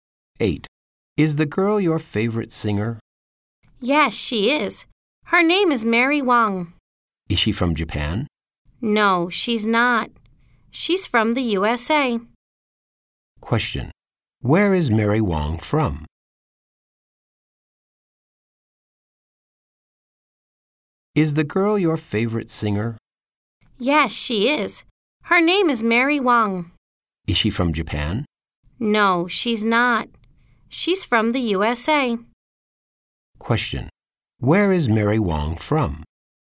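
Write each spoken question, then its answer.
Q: Where is Mary Wang from?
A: The USA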